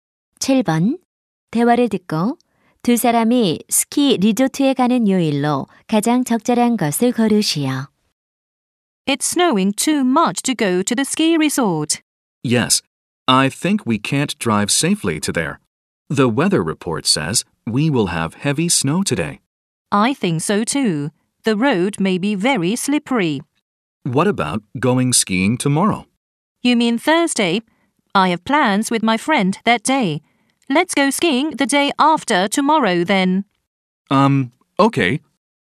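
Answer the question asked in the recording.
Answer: 금요일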